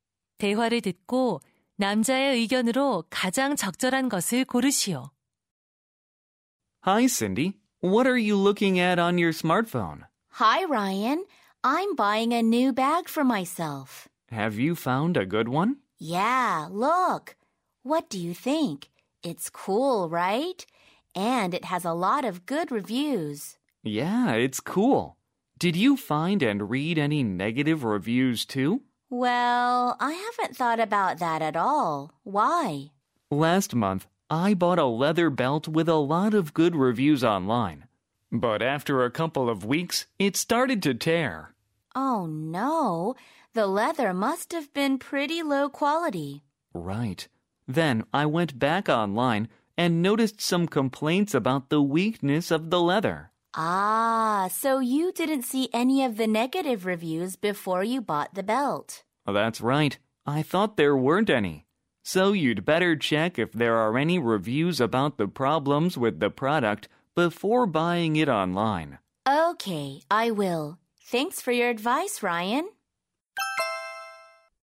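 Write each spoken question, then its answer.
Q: 대화를 듣고 남자의 의견으로 가장 적절한 것을 고르시오.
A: 온라인 구매 전 제품의 부정적인 후기를 확인해야 한다.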